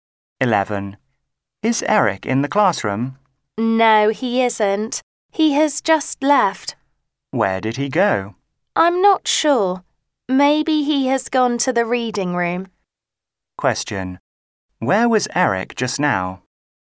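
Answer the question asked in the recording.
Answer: In the classroom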